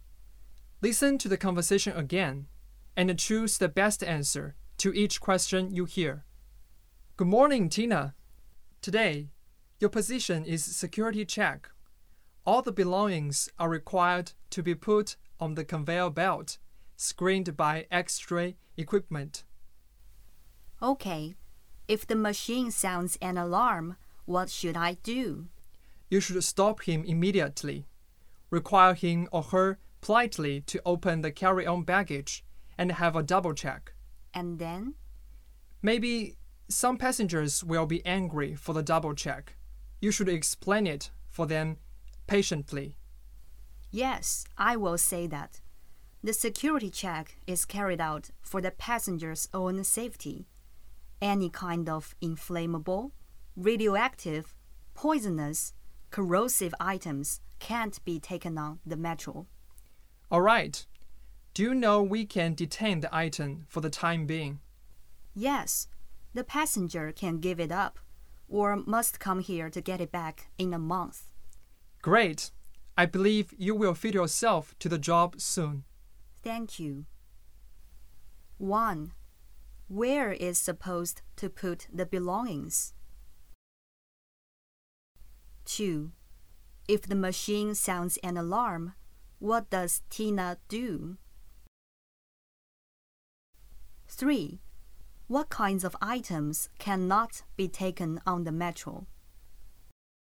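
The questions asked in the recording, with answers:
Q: Where is supposed to put the belongings?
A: On the conveyor belt

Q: If the machine sounds an alarm, what does Tina do?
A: Stop the passenger and ask them politely to open the carry-on baggage for a double check

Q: What kinds of items cannot be taken on the metro?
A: Inflammable, radioactive, poisonous and corrosive items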